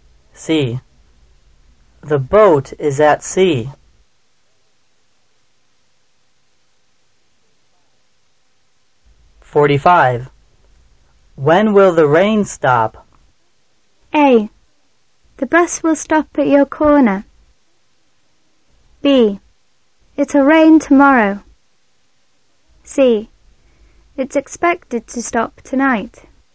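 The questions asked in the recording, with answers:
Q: When will the rain stop?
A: C: It's expected to stop tonight.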